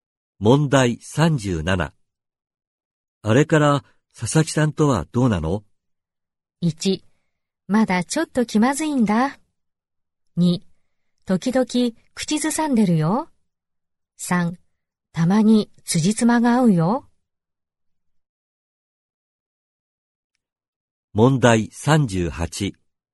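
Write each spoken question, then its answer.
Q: あれから佐々木さんとはどうなの?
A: 1: まだちょっと気まずいんだ。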